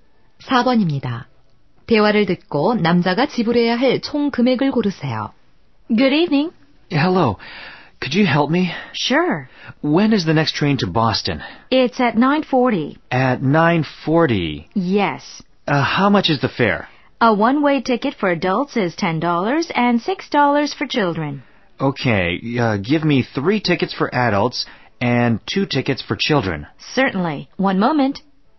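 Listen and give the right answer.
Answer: 42달러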